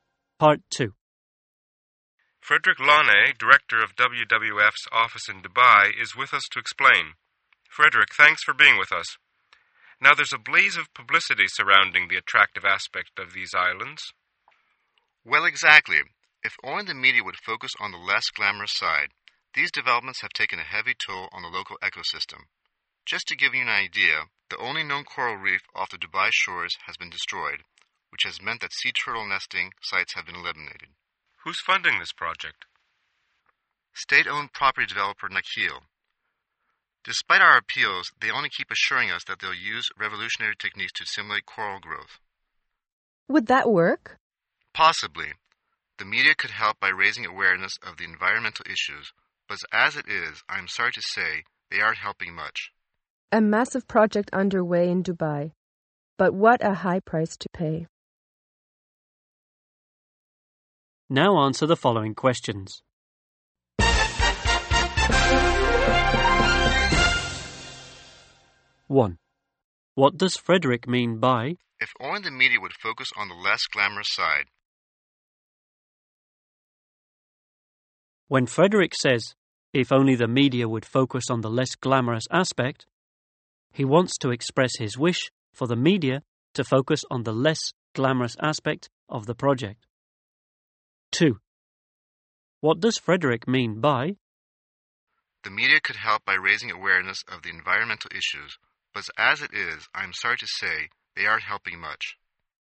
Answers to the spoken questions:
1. he wants to express his wish for the media to focus on the less glamorous aspect of the project.
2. he wants to express his disappointment that the media are not helping much.